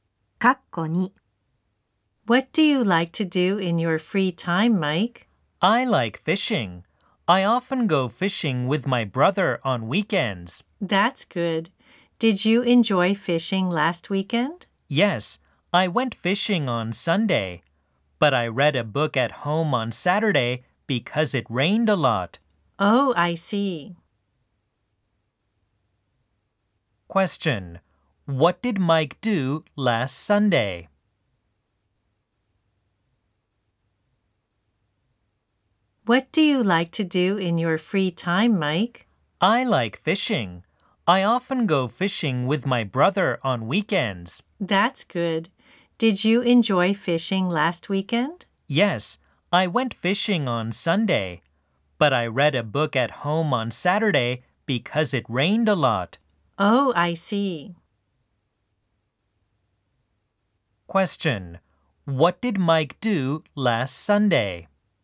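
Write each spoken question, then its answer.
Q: Question: What did Mike do last Sunday?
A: He went fishing.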